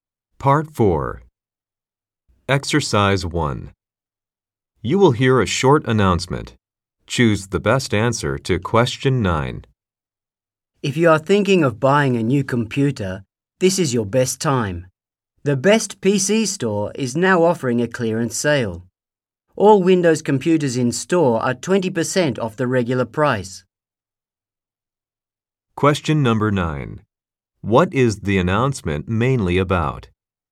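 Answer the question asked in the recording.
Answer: A clearance sale on computers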